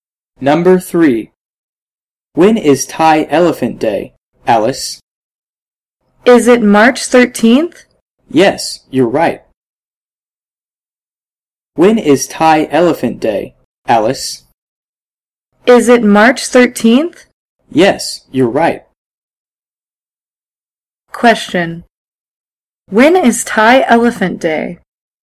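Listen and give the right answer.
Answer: March 13th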